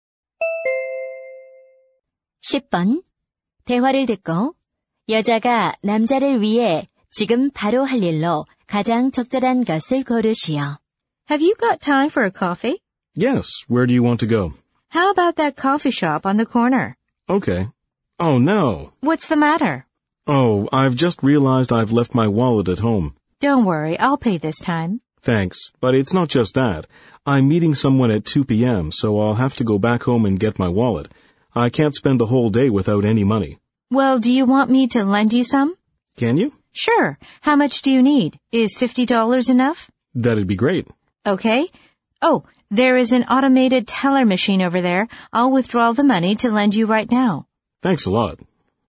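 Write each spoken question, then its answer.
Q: 대화를 듣고 여자가 남자를 위해 지금 바로 할 일로 가장 적절한 것을 고르시오.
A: 현금인출기에서 돈 인출하기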